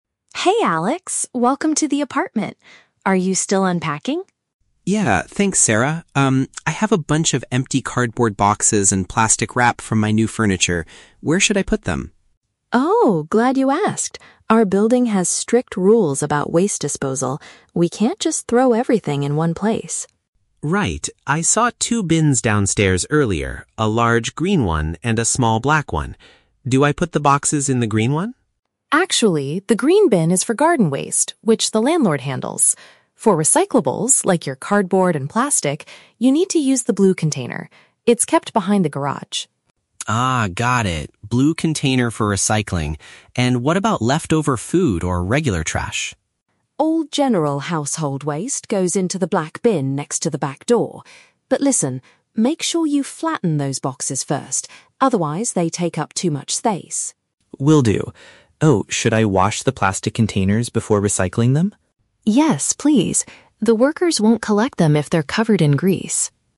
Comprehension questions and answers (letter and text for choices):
Listen to the conversation between two roommates and choose the correct answer (A, B, or C) for each question.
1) Where is the correct place for Alex's packaging materials?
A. In the green disposal unit.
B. In the blue recycling bin.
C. In the black trash can.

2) What must Alex do before throwing away his cardboard boxes?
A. He needs to tear them into small pieces.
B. He has to make them completely flat.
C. He should wash them with water.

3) Why might the waste workers refuse to take the plastic items?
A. Because they take up too much space.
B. Because they are placed behind the garage.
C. Because they still have food oil on them.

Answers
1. B. In the blue recycling bin.
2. B. He has to make them completely flat.
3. C. Because they still have food oil on them.

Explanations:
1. The script mentions that "cardboard and plastic" (which are Alex's packaging materials) must go into the "blue container". Option A is a trap because the green bin is mentioned, but it is rejected (it is only for garden waste). Option C is also a trap; the black bin is for "general household waste", not recycling.
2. Sarah tells Alex to "flatten those boxes first". "Make them completely flat" is a synonym (paraphrase) for "flatten". Option C is a trap because washing is required for plastic containers, not cardboard boxes. Option A is plausible in real life but is never mentioned in the audio.
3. Sarah says they won't collect the plastics "if they're covered in grease". "Food oil" is a paraphrase for "grease". Option A is a trap because taking up "too much space" is the reason for flattening boxes, not the reason for refusing plastic items. Option B is just a detail about where the blue bin is located.

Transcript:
Sarah: Hey Alex, welcome to the apartment! Are you still unpacking?
Alex: Yeah, thanks Sarah. Um, I have a bunch of empty cardboard boxes and plastic wrap from my new furniture. Where should I put them?
Sarah: Oh, glad you asked. Our building has strict rules about waste disposal. We can't just throw everything in one place.
Alex: Right. I saw two bins downstairs earlier, a large green one and a small black one. Do I put the boxes in the green one?
Sarah: Actually, the green bin is for garden waste, which the landlord handles. For recyclables, like your cardboard and plastic, you need to use the blue container. It's kept behind the garage.
Alex: Ah, got it. Blue container for recycling. And what about leftover food or regular trash?
Sarah: All general household waste goes into the black bin next to the back door. But listen, make sure you flatten those boxes first, otherwise, they take up too much space.
Alex: Will do. Oh, should I wash the plastic containers before recycling them?